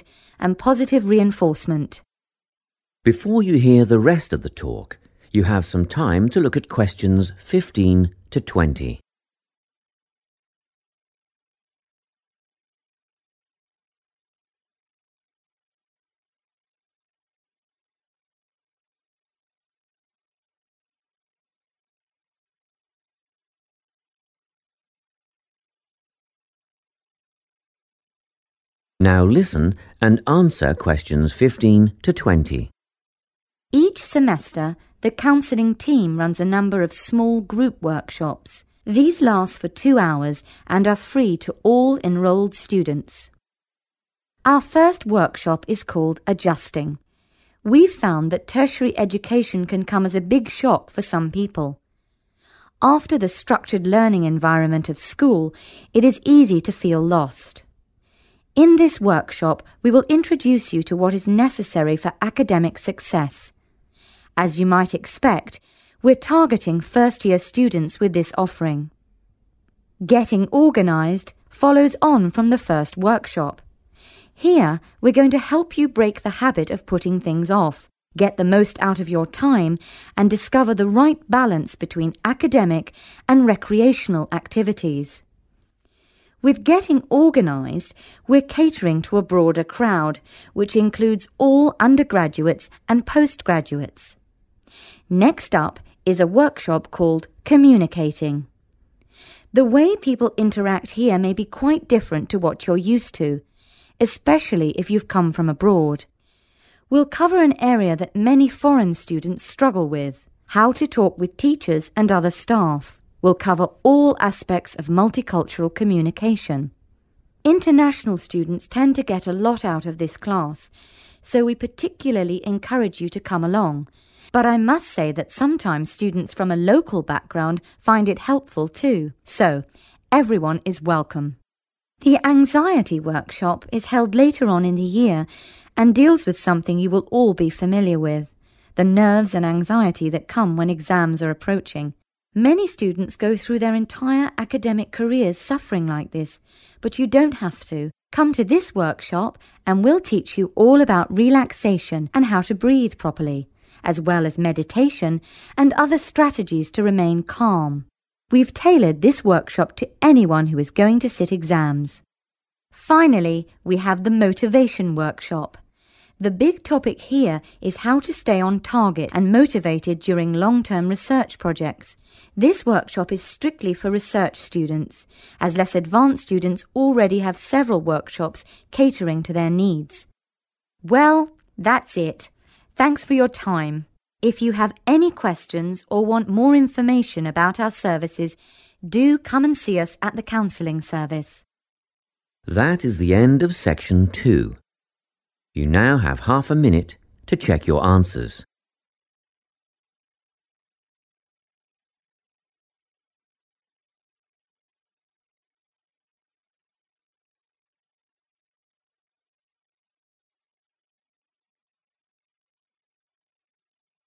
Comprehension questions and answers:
Write NO MORE THAN TWO WORDS for each answer.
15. students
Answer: first / 1st year

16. use time effectively, find 16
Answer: right balance / balance

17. all students, especially 17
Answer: international students / international / foreign students / foreign

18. breathing techniques, meditation, etc.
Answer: relaxation

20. students only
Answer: research / advanced

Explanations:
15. The correct answer is 'first-year' because the speaker describes a workshop called 'Adjusting.' This workshop helps students understand what they need for academic success. The speaker says they are 'targeting,' or focusing on, students who are just starting their first year of education.
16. The correct answer is '(right) balance' because the speaker explains that the 'Getting organised' workshop helps students use their time better. Specifically, it helps them find the correct mix, or 'balance', between their 'academic' (school/study) duties and 'recreational' (fun/leisure) activities.
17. The correct answer is supported by the speaker's focus on students from other countries when describing the Communicating workshop. The speaker mentions that the workshop addresses struggles common to foreign students, such as speaking with staff and multicultural communication, and explicitly encourages international students to attend because they benefit the most from it.
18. The correct answer is "relaxation" because the speaker lists it as the first skill taught in the Anxiety workshop. The workshop is designed to help students manage nerves before exams by teaching them relaxation, correct breathing, and meditation.
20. The correct answer is research or advanced because the speaker states that the Motivation workshop is only for students working on research projects. By mentioning that students who are 'less-advanced' already have other classes, the speaker clarifies that this specific target group consists of those at a higher, more advanced level of education.

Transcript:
Tony is our newest addition to the counselling team. He is our only male counsellor and he has an extensive background in stress management and relaxation techniques. We encourage anyone who is trying to deal with anxiety to see him. Tony will introduce you to a full range of techniques to help you cope with this problem such as body awareness, time management and positive reinforcement.
Before you hear the rest of the talk, you have some time to look at questions 15 to 20.
Now listen and answer questions 15 to 20.
Each semester the counselling team runs a number of small group workshops. These last for two hours and are free to all enrolled students.
Our first workshop is called Adjusting. We've found that tertiary education can come as a big shock for some people. After the structured learning environment of school, it is easy to feel lost. In this workshop, we will introduce you to what is necessary for academic success. As you might expect, we're targeting first-year students with this offering.
Getting organised follows on from the first workshop. Here, we're going to help you break the habit of putting things off, get the most out of your time and discover the right balance between academic and recreational activities. With Getting organised, we're catering to a broader crowd, which includes all undergraduates and postgraduates.
Next up is a workshop called Communicating. The way people interact here may be quite different to what you're used to, especially if you've come from abroad. We'll cover an area that many foreign students struggle with – how to talk with teachers and other staff. We'll cover all aspects of multicultural communication. International students tend to get a lot out of this class, so we particularly encourage you to come along, but I must say that sometimes students from a local background find it helpful too. So, everyone is welcome!
The Anxiety workshop is held later on in the year and deals with something you will all be familiar with – the nerves and anxiety that come when exams are approaching. Many students go through their entire academic careers suffering like this, but you don't have to. Come to this workshop and we'll teach you all about relaxation and how to breathe properly, as well as meditation and other strategies to remain calm. We've tailored this workshop to anyone who is going to sit exams.
Finally, we have the Motivation workshop. The big topic here is how to stay on target and motivated during long-term research projects. This workshop is strictly for research students, as less-advanced students already have several workshops catering to their needs.
Well, that's it, thanks for your time. If you have any questions or want more information about our services, do come and see us at the Counselling Service.
That is the end of section 2. You now have half a minute to check your answers.